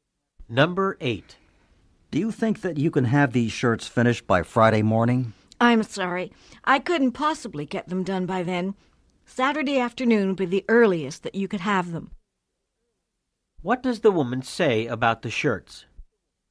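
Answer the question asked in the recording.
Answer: They can't be ready until Saturday afternoon.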